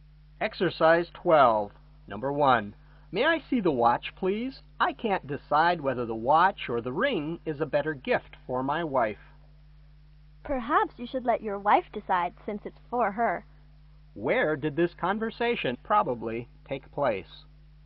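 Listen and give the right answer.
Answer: At a jewelry store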